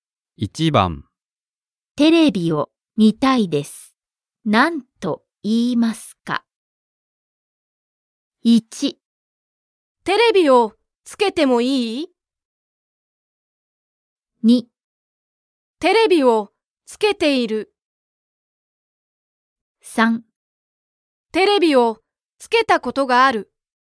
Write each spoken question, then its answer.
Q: テレビを見たいです。何と言いますか?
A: Choice 1. テレビをつけてもいい?